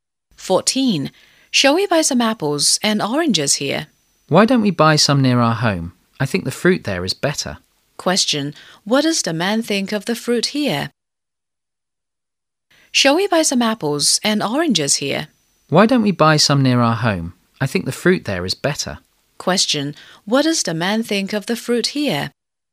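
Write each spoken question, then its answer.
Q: Question, what does the man think of the fruit here?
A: It isn't as good as the fruit near their home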